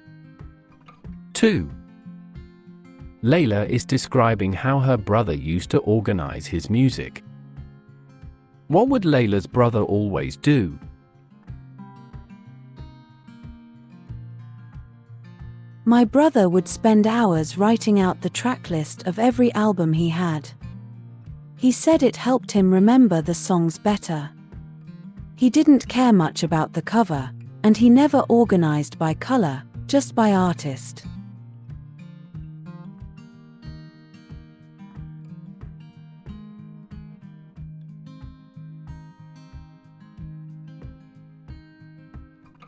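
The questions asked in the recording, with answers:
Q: What would Layla's brother always do?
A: write out the tracklist of every album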